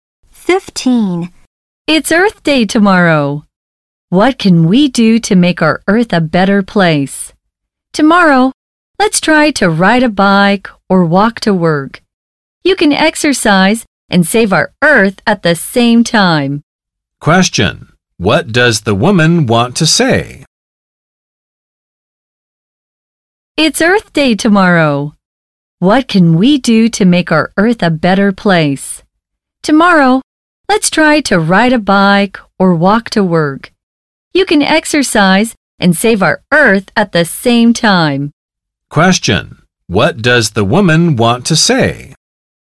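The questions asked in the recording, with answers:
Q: What does the woman want to say?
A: Ride a bike or walk to work to help save the Earth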